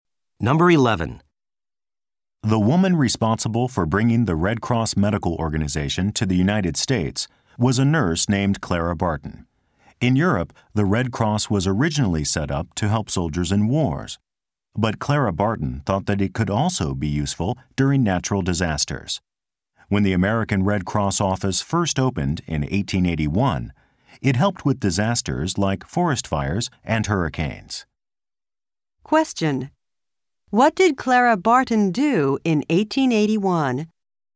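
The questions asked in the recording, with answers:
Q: What did Clara Barton do in 1881?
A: She opened the American Red Cross office, which helped with natural disasters.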